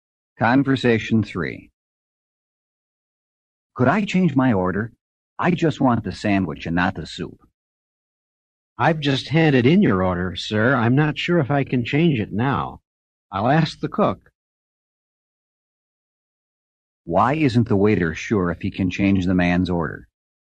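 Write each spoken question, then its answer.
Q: Why isn't the waiter sure if he can change the man's order?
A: He has already handed in the order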